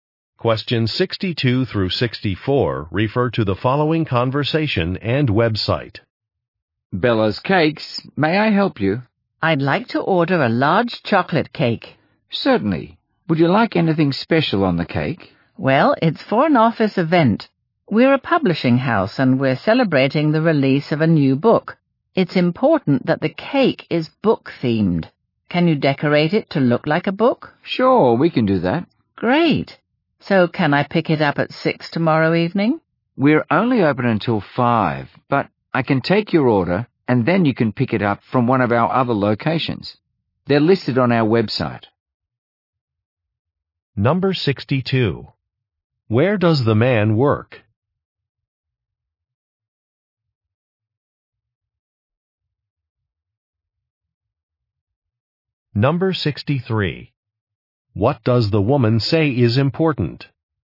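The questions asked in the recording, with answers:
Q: Where does the man work?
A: At a publishing house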